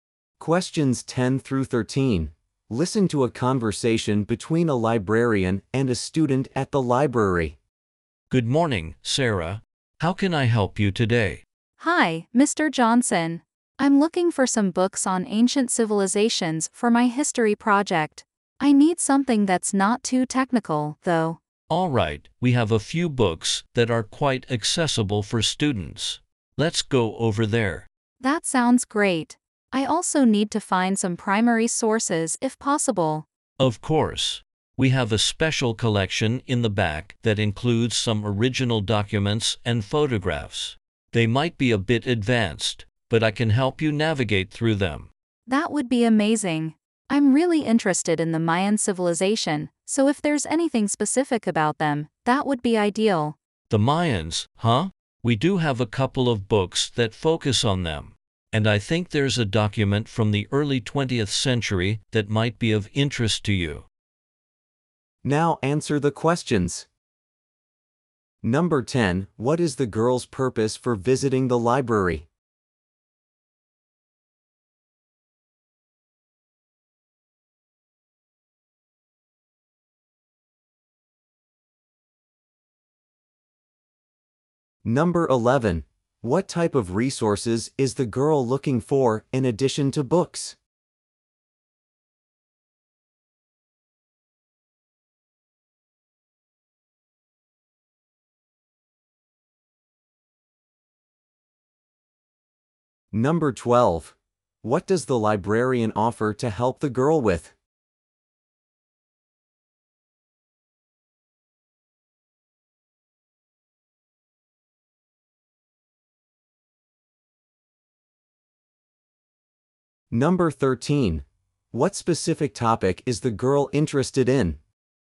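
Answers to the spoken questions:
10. To find books for her history project
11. Primary sources
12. Navigating the special collection of original documents
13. The Mayan civilization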